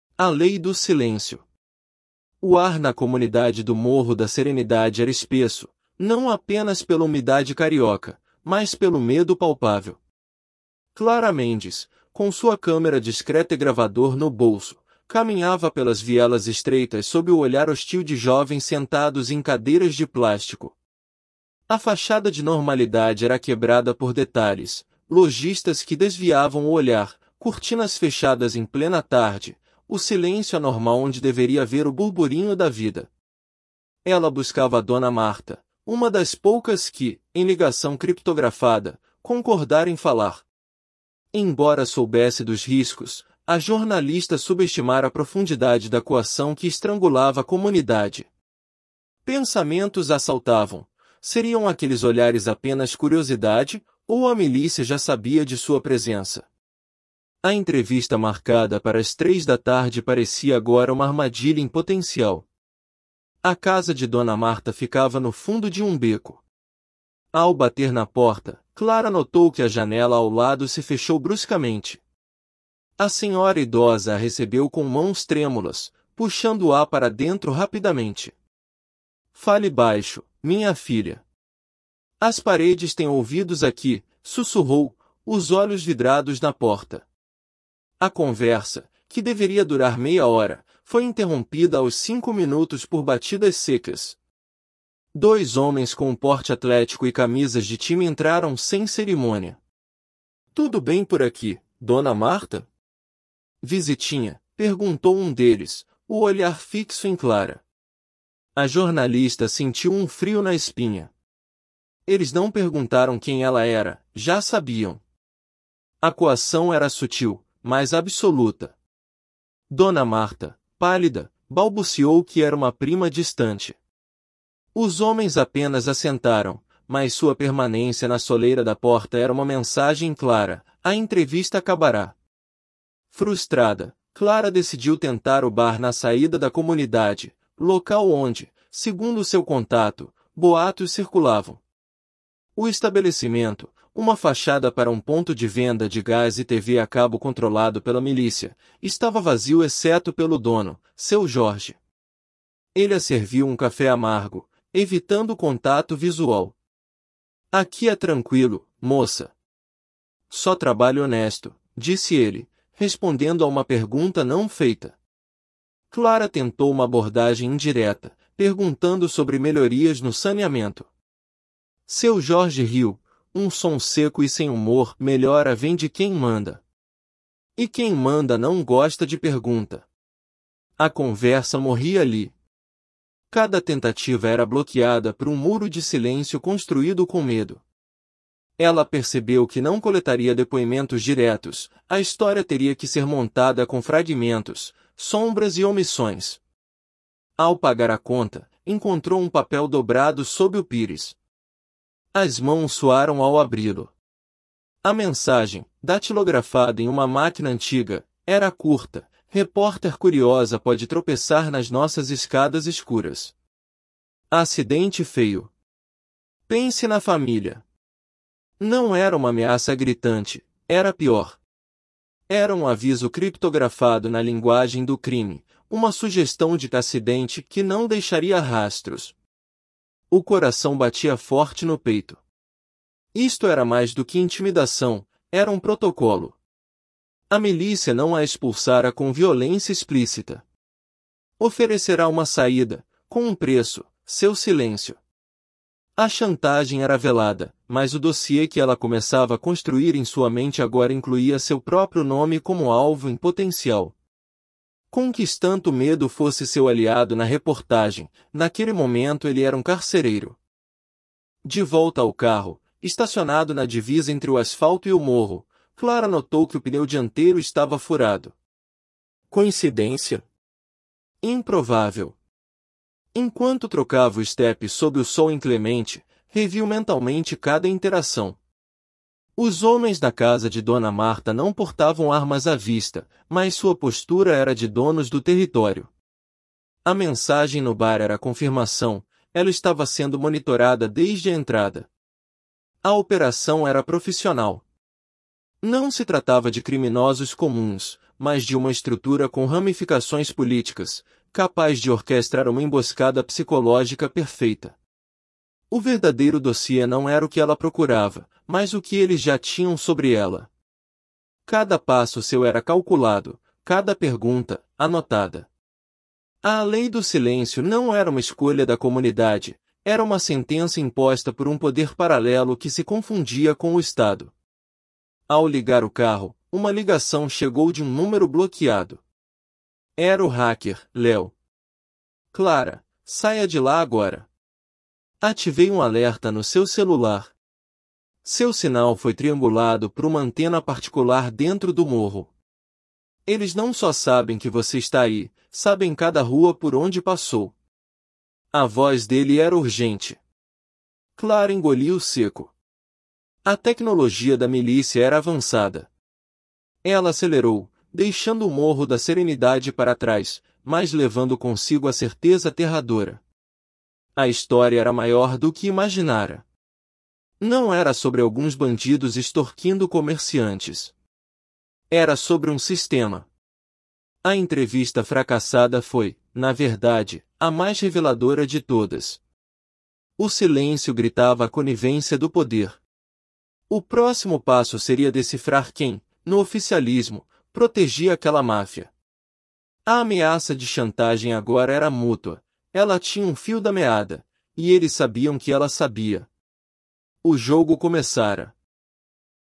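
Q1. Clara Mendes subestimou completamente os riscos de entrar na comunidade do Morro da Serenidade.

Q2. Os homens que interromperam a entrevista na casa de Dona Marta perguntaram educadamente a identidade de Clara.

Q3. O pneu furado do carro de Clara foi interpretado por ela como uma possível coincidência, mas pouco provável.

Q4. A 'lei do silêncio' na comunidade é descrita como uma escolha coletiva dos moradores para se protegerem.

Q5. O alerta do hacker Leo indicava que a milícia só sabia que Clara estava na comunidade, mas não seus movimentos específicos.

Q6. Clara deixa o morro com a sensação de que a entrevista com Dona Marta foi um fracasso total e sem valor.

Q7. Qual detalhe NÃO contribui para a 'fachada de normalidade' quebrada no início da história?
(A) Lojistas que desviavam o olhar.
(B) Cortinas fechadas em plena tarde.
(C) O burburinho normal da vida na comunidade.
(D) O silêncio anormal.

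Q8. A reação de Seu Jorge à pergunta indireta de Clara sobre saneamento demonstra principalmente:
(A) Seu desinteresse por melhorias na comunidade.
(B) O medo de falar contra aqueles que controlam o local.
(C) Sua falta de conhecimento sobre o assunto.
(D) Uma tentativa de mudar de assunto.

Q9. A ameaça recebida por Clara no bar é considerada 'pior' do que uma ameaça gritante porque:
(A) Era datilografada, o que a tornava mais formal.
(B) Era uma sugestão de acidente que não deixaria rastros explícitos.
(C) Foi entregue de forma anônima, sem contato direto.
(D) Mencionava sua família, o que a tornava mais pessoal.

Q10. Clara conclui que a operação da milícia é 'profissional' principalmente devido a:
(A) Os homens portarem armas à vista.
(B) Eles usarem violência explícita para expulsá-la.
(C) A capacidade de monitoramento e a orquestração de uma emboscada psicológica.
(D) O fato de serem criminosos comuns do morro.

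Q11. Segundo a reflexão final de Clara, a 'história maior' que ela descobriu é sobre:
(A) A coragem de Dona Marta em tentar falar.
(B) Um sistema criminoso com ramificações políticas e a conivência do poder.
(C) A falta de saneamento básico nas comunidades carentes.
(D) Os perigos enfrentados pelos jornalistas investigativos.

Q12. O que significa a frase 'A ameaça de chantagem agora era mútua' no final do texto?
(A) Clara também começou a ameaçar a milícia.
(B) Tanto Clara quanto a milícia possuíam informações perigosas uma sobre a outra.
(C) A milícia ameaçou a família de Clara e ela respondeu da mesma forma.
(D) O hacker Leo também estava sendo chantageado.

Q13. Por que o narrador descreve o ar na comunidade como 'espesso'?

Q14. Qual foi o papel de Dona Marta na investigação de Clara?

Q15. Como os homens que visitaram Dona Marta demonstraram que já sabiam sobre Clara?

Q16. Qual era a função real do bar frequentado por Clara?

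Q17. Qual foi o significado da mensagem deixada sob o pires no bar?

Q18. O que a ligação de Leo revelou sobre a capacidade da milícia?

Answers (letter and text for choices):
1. Falso
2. Falso
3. Verdadeiro
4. Falso
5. Falso
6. Falso
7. (C) O burburinho normal da vida na comunidade.
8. (B) O medo de falar contra aqueles que controlam o local.
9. (B) Era uma sugestão de acidente que não deixaria rastros explícitos.
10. (C) A capacidade de monitoramento e a orquestração de uma emboscada psicológica.
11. (B) Um sistema criminoso com ramificações políticas e a conivência do poder.
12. (B) Tanto Clara quanto a milícia possuíam informações perigosas uma sobre a outra.
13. Não apenas pela umidade carioca, mas pelo medo palpável.
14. Era uma das poucas moradoras que concordaram em falar, numa entrevista.
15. Não perguntaram quem ela era; olharam fixamente para ela.
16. Uma fachada para um ponto de venda de gás e TV a cabo controlado pela milícia.
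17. Uma ameaça de morte velada: um acidente sem rastros se ela não se calasse.
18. Tinha tecnologia avançada: triangulou o sinal do celular e sabia cada rua por onde ela passou.

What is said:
A Lei do Silêncio – TEST
O ar na comunidade do Morro da Serenidade era espesso, não apenas pela umidade carioca, mas pelo medo palpável. Clara Mendes, com sua câmera discreta e gravador no bolso, caminhava pelas vielas estreitas sob o olhar hostil de jovens sentados em cadeiras de plástico. A fachada de normalidade era quebrada por detalhes: lojistas que desviavam o olhar, cortinas fechadas em plena tarde, o silêncio anormal onde deveria haver o burburinho da vida. Ela buscava Dona Marta, uma das poucas que, em ligação criptografada, concordara em falar. Embora soubesse dos riscos, a jornalista subestimara a profundidade da coação que estrangulava a comunidade. Pensamentos a assaltavam: Seriam aqueles olhares apenas curiosidade, ou a milícia já sabia de sua presença? 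A entrevista marcada para as três da tarde parecia agora uma armadilha em potencial.
A casa de Dona Marta ficava no fundo de um beco. Ao bater na porta, Clara notou que a janela ao lado se fechou bruscamente. A senhora idosa a recebeu com mãos trêmulas, puxando-a para dentro rapidamente. 'Fale baixo, minha filha. As paredes têm ouvidos aqui', sussurrou, os olhos vidrados na porta. A conversa, que deveria durar meia hora, foi interrompida aos cinco minutos por batidas secas. Dois homens com porte atlético e camisas de time entraram sem cerimônia. 'Tudo bem por aqui, Dona Marta? Visitinha?', perguntou um deles, o olhar fixo em Clara. A jornalista sentiu um frio na espinha. Eles não perguntaram quem ela era; já sabiam. A coação era sutil, mas absoluta. Dona Marta, pálida, balbuciou que era uma prima distante. Os homens apenas assentaram, mas sua permanência na soleira da porta era uma mensagem clara: a entrevista acabara.
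Frustrada, Clara decidiu tentar o bar na saída da comunidade, local onde, segundo seu contato, boatos circulavam. O estabelecimento, uma fachada para um ponto de venda de gás e TV a cabo controlado pela milícia, estava vazio exceto pelo dono, Seu Jorge. Ele a serviu um café amargo, evitando contato visual. 'Aqui é tranquilo, moça. Só trabalho honesto', disse ele, respondendo a uma pergunta não feita. Clara tentou uma abordagem indireta, perguntando sobre melhorias no saneamento. Seu Jorge riu, um som seco e sem humor. 'Melhora vem de quem manda. E quem manda não gosta de pergunta.' A conversa morria ali. Cada tentativa era bloqueada por um muro de silêncio construído com medo. Ela percebeu que não coletaria depoimentos diretos; a história teria que ser montada com fragmentos, sombras e omissões.
Ao pagar a conta, encontrou um papel dobrado sob o pires. As mãos suaram ao abri-lo. A mensagem, datilografada em uma máquina antiga, era curta: 'Repórter curiosa pode tropeçar nas nossas escadas escuras. 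Acidente feio. Pense na família.' Não era uma ameaça gritante; era pior. Era um aviso criptografado na linguagem do crime, uma sugestão de 'acidente' que não deixaria rastros. O coração batia forte no peito. Isto era mais do que intimidação; era um protocolo. A milícia não a expulsara com violência explícita. Oferecera uma saída, com um preço: seu silêncio. A chantagem era velada, mas o dossiê que ela começava a construir em sua mente agora incluía seu próprio nome como alvo em potencial. Conquistanto o medo fosse seu aliado na reportagem, naquele momento ele era um carcereiro.
De volta ao carro, estacionado na divisa entre o asfalto e o morro, Clara notou que o pneu dianteiro estava furado. Coincidência? Improvável. Enquanto trocava o estepe sob o sol inclemente, reviu mentalmente cada interação. Os homens na casa de Dona Marta não portavam armas à vista, mas sua postura era de donos do território. 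A mensagem no bar era a confirmação: ela estava sendo monitorada desde a entrada. A operação era profissional. Não se tratava de criminosos comuns, mas de uma estrutura com ramificações políticas, capaz de orquestrar uma emboscada psicológica perfeita. O verdadeiro dossiê não era o que ela procurava, mas o que eles já tinham sobre ela. Cada passo seu era calculado, cada pergunta, anotada. A 'lei do silêncio' não era uma escolha da comunidade; era uma sentença imposta por um poder paralelo que se confundia com o Estado.
Ao ligar o carro, uma ligação chegou de um número bloqueado. Era o hacker, Leo. 'Clara, saia de lá agora. Ativei um alerta no seu celular. Seu sinal foi triangulado por uma antena particular dentro do morro. Eles não só sabem que você está aí, sabem cada rua por onde passou.' A voz dele era urgente. Clara engoliu seco. A tecnologia da milícia era avançada. Ela acelerou, deixando o Morro da Serenidade para trás, mas levando consigo a certeza aterradora. 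A história era maior do que imaginara. Não era sobre alguns bandidos extorquindo comerciantes. Era sobre um sistema. A entrevista fracassada foi, na verdade, a mais reveladora de todas. O silêncio gritava a conivência do poder. O próximo passo seria decifrar quem, no oficialismo, protegia aquela máfia. A ameaça de chantagem agora era mútua; ela tinha um fio da meada, e eles sabiam que ela sabia. O jogo começara.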